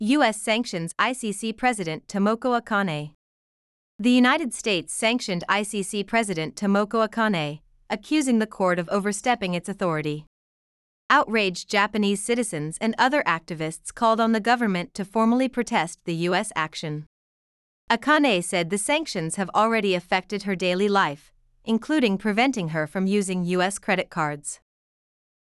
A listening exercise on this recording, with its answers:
次の各質問の答えを探しながらリスニングし、英語または日本語で答えてください。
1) What did outraged Japanese citizens and other activists do?(憤慨した日本人やその他の活動家は何をしましたか。)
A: They called on the government to formally protest the US action.

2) How have the sanctions affected Akane's daily life?(制裁は赤根所長の日常生活にどのような影響を与えていますか。)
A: She can no longer use US credit cards.

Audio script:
US Sanctions ICC President Tomoko Akane
The United States sanctioned ICC President Tomoko Akane, accusing the court of overstepping its authority.
Outraged Japanese citizens and other activists called on the government to formally protest the US action.
Akane said the sanctions have already affected her daily life, including preventing her from using US credit cards.